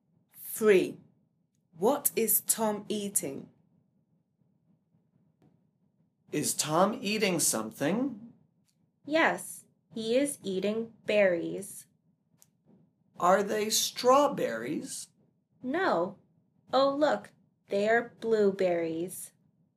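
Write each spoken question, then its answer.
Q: What is Tom eating?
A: Blueberries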